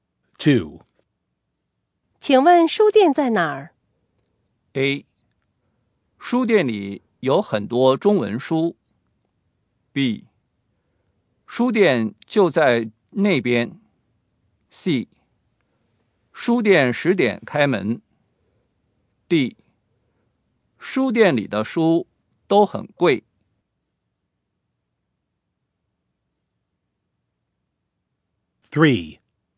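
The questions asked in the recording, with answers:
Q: 请问书店在哪儿?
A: B: 书店就在那边。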